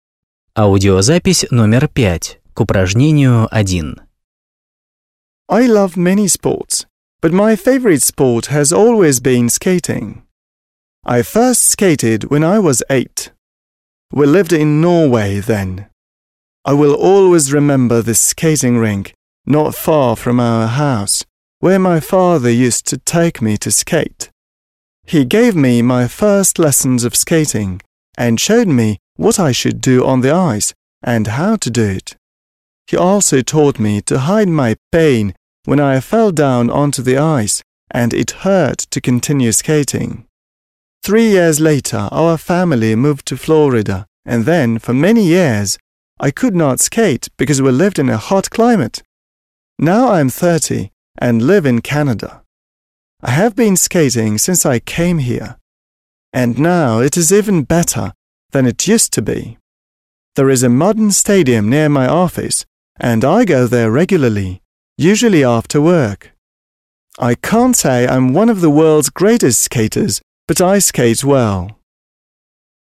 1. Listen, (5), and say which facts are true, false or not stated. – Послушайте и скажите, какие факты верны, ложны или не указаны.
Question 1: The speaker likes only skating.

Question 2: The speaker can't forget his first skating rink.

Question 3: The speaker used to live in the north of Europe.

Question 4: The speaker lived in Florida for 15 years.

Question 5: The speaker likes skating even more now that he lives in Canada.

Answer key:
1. False
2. True
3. True
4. Not stated
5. True

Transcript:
I love many sports but my favourite sport has always been skating. I first skated when I was eight. We lived in Norway then. I will always remember this skating rink, not far from our house, where my father used to take me to skate. He gave me my first lessons of skating and showed me what I should do on the ice and how to do it. He also told me to hide my pain when I fell down onto the ice and it hurt to continue skating. Three years later our family moved to Florida and then for many years I could not skate because we lived in hot climate. Now I'm thirty and live in Canada. I have been skating since I came here. And now it is even better than it used to be. There is a modern stadium near my office and I go there regularly, usually after work. I can't say I'm one of the world's greatest skaters but I skate well.

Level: 8 класс